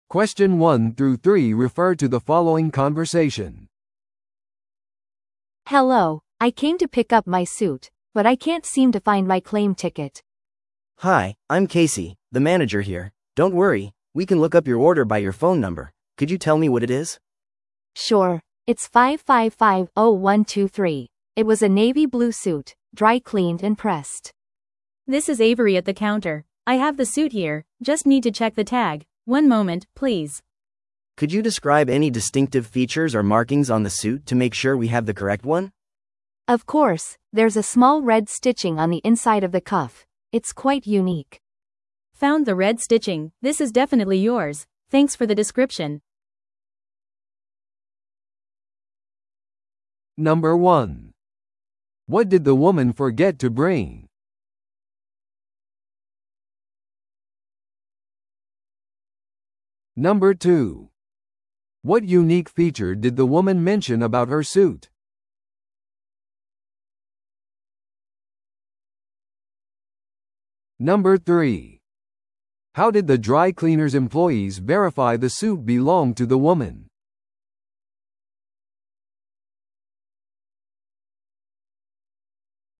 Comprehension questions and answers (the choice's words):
Listen to the audio below and answer the questions.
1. What did the woman forget to bring?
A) 電話番号。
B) スーツの領収書。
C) 預かり証。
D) スーツの説明。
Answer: 預かり証。

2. What unique feature did the woman mention about her suit?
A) 襟に青いリボンがついている。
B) カフスに赤いステッチがある。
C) タグにブランド名が書かれている。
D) ジャケットに自分のイニシャルがある。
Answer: カフスに赤いステッチがある。

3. How did the dry cleaner's employees verify the suit belonged to the woman?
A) 彼女の電話番号で電話をかけることによって。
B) スーツの色を確認することによって。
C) 彼女のIDカードを求めることによって。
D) 赤いステッチを見つけることによって。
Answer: 赤いステッチを見つけることによって。

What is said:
A: Hello, I came to pick up my suit, but I can't seem to find my claim ticket.
B: Hi, I'm Casey, the manager here. Don't worry, we can look up your order by your phone number. Could you tell me what it is?
A: Sure, it's 555-0123. It was a navy blue suit, dry-cleaned and pressed.
C: This is Avery at the counter. I have the suit here—just need to check the tag. One moment, please.
B: Could you describe any distinctive features or markings on the suit to make sure we have the correct one?
A: Of course, there's a small red stitching on the inside of the cuff. It's quite unique.
C: Found the red stitching, this is definitely yours. Thanks for the description!